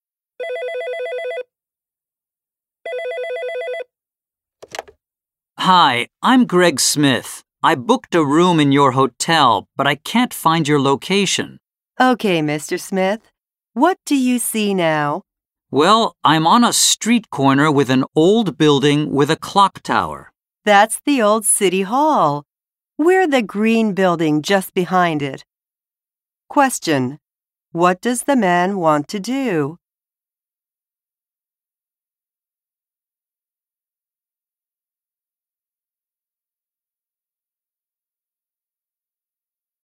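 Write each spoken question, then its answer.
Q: What does the man want to do?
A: Find the location of his hotel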